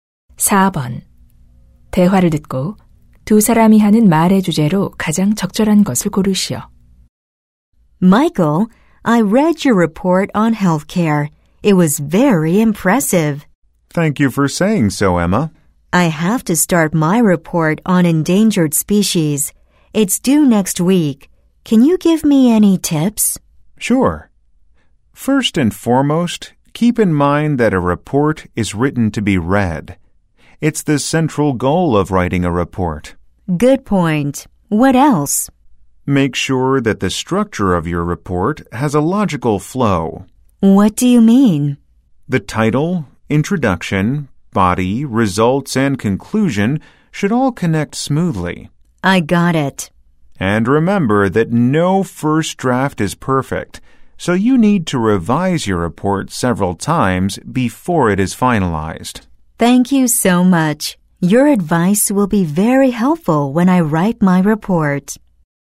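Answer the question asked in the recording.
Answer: 보고서를 잘 쓰는 방법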